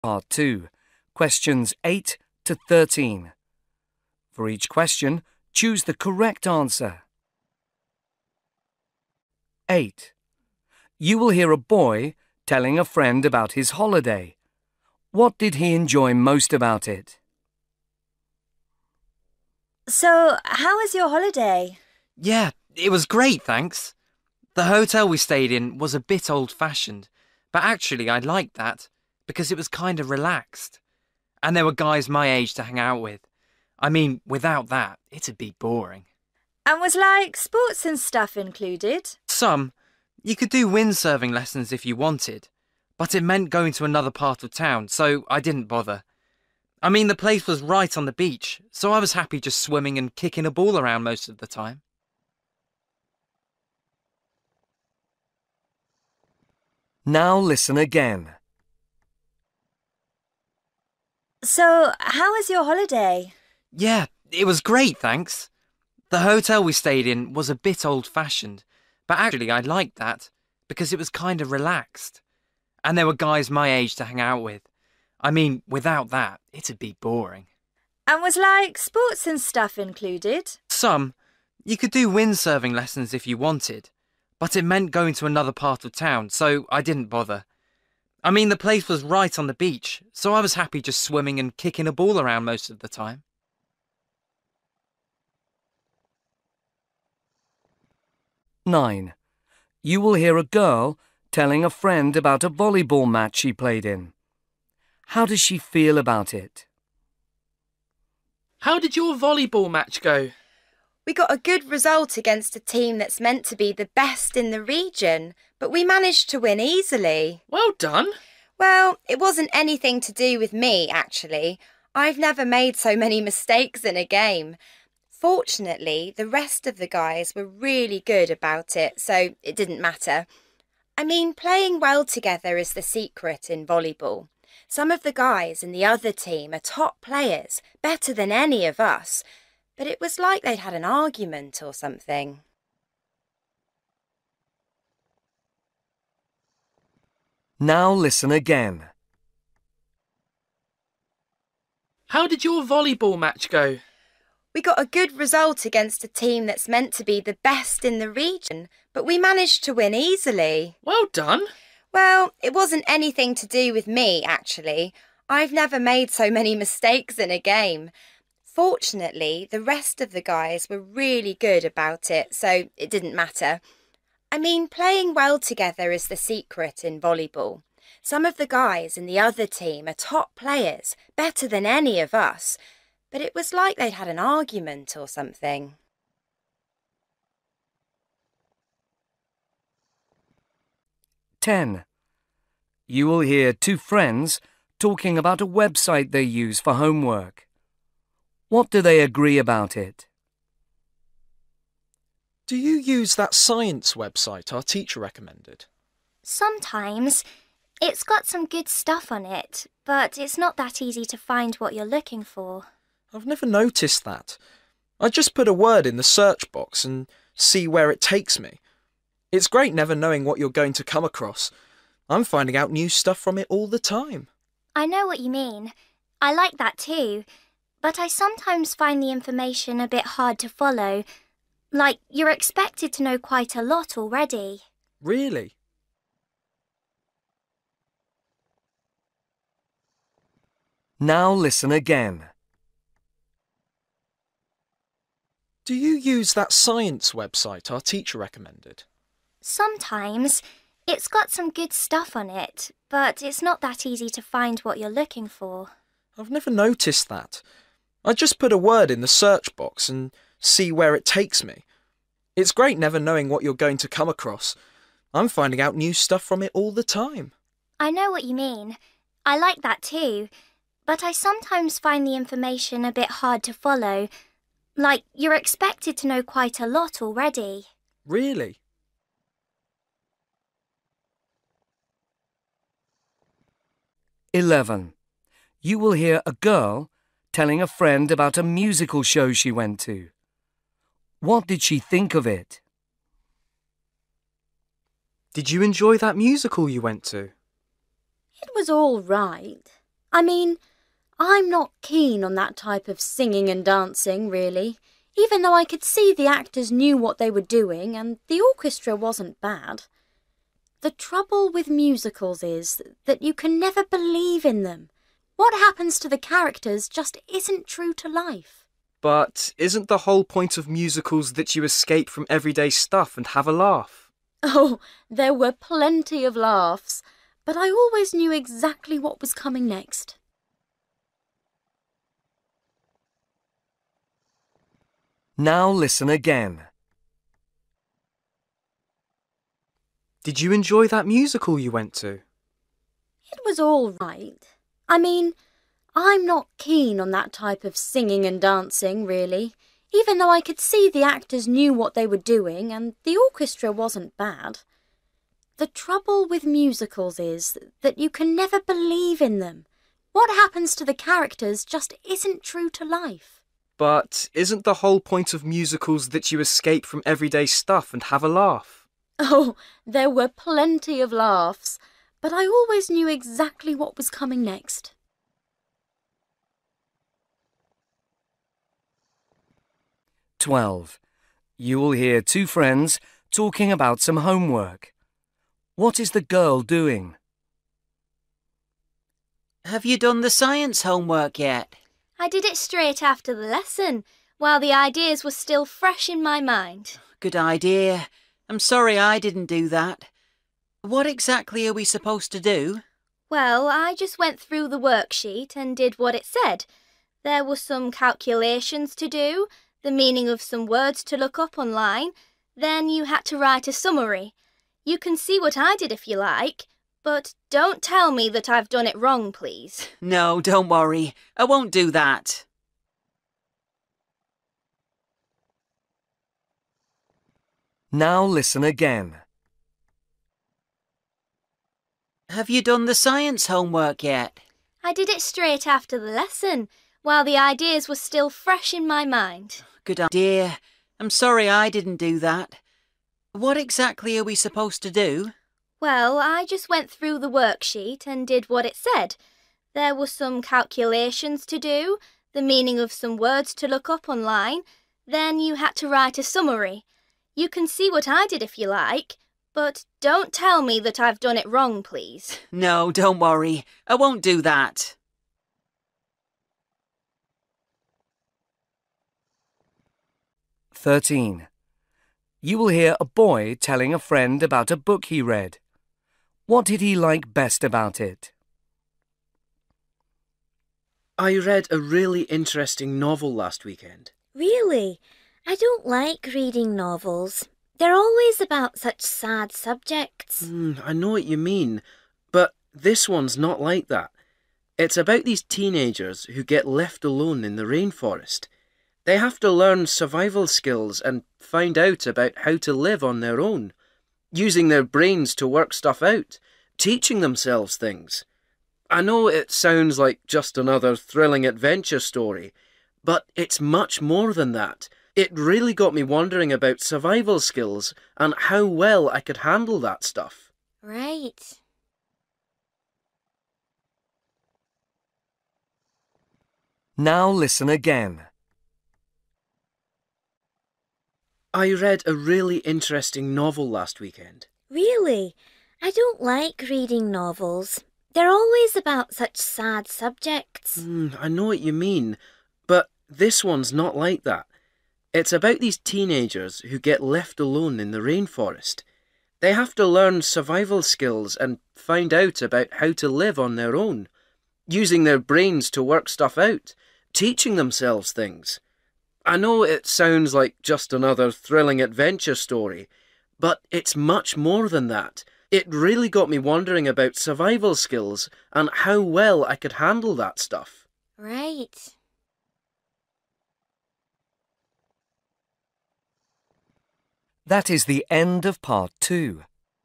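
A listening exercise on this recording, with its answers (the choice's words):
You will hear people talking in eight different situations. For questions 8-13, choose the best answer (A, B or C).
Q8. You will hear a boy telling a friend about his holiday. What did he enjoy most about it?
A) The sort of people he met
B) The up-to-date accommodation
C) The range of organised activities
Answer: The sort of people he met

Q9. You will hear a girl telling a friend about a voleyball match she played in. How does she feel about it?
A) Satisfied with her own performance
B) Grateful for the support of her team mates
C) Impressed by the skills of players on both sides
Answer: Grateful for the support of her team mates

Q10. You will hear two friends talking about a website they use for homework. What do they agree about it?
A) How simple it is to use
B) How much you can learn from it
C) How clearly things are explained on it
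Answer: How much you can learn from it

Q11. You will hear a girl telling a friend about a musical show she went to. What did she think of it?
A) The story wasn't realistic enough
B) The music wasn't very well played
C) The jokes weren't particularly funny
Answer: The story wasn't realistic enough

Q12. You will hear two friends talking about some homework. What is the girl doing?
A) Explaining how she approached it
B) Suggesting that they do it together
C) Admitting that she didn't understand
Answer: Explaining how she approached it

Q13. You will hear a boy telling a friend about a book he read. What did he like best about it?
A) The age of the characters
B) How exciting the story was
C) What it made him think about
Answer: What it made him think about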